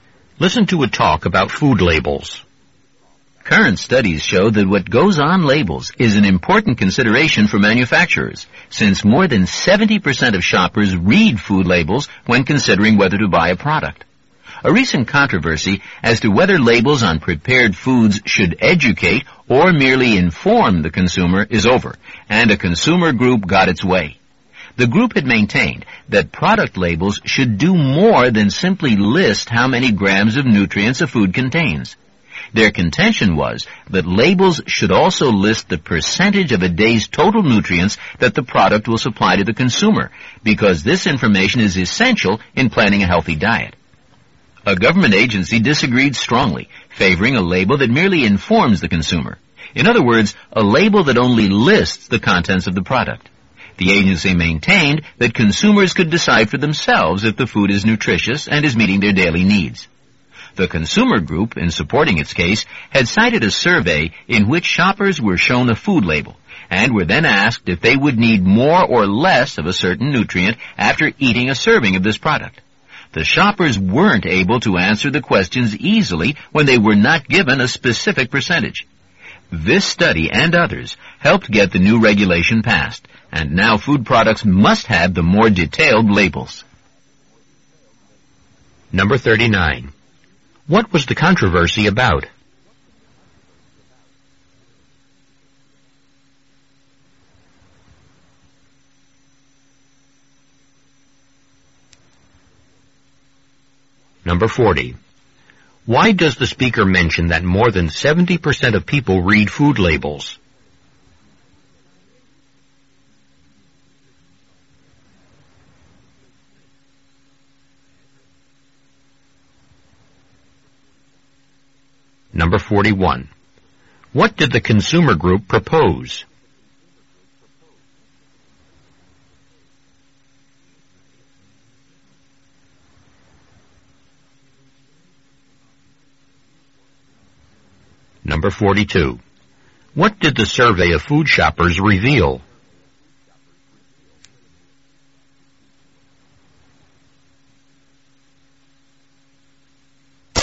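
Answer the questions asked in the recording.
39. Whether food labels should educate or merely inform consumers
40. To show that what goes on labels is important to manufacturers
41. That labels also list the percentage of a day's total nutrients the product supplies
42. Shoppers couldn't easily tell if they needed more or less of a nutrient without a specific percentage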